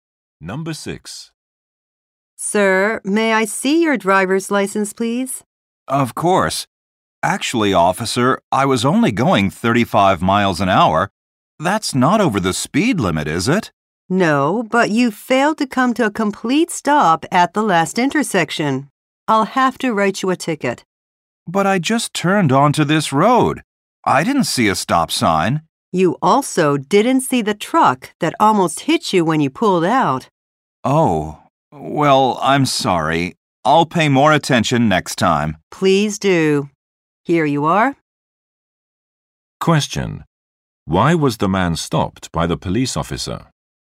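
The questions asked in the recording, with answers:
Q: Why was the man stopped by the police officer?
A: He didn't come to a complete stop at the intersection.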